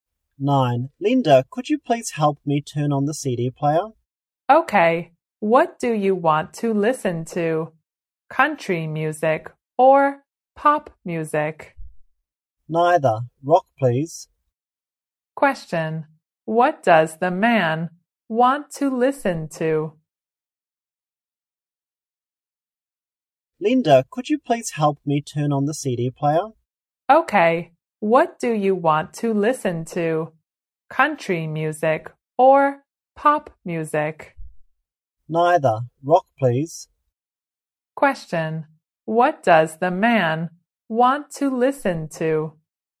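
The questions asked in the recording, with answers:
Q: What does the man want to listen to?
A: Rock music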